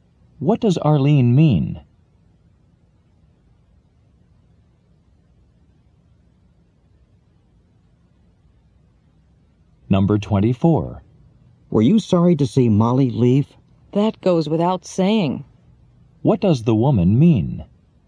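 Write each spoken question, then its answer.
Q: What does the woman mean?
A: Of course she was sorry to see Molly leave.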